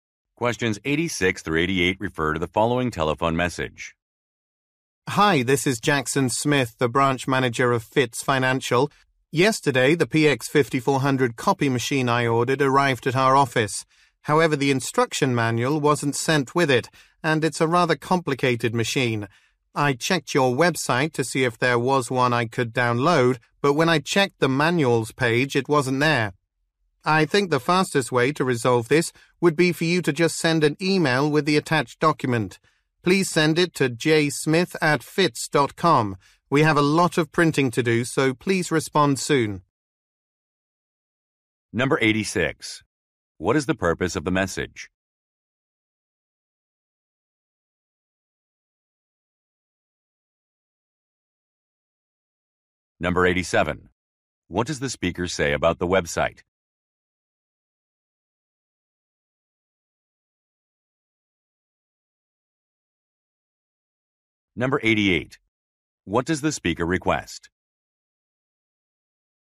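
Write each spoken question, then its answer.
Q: What is the purpose of the message?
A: To request an instruction manual for a copy machine

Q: What does the speaker say about the website?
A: The manual was not on it

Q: What does the speaker request?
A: That the manual be sent by email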